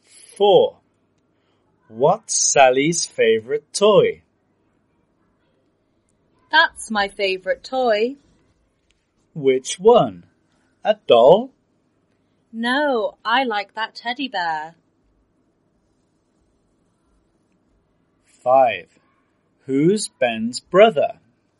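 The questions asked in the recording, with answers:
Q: What's Sally's favorite toy?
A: The teddy bear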